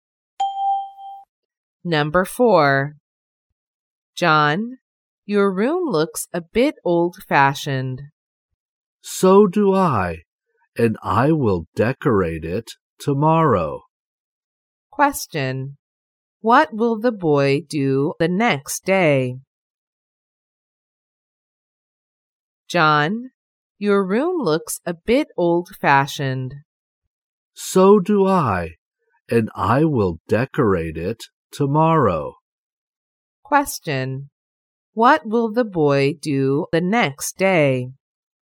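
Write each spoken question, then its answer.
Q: What will the boy do the next day?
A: Decorate his room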